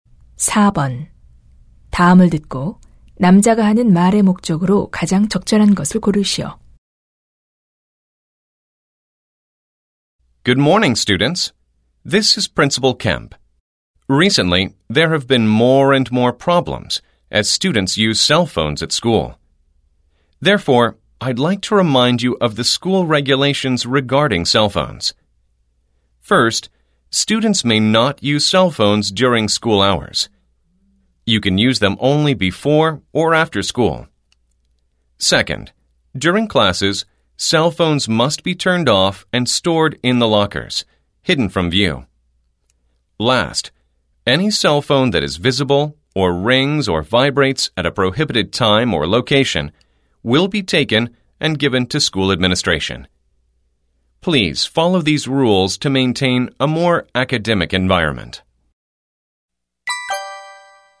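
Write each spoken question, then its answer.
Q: 다음을 듣고 남자가 하는 말의 목적으로 가장 적절한 것을 고르시오.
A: 학교 휴대전화 사용 규정을 다시 알려 주려고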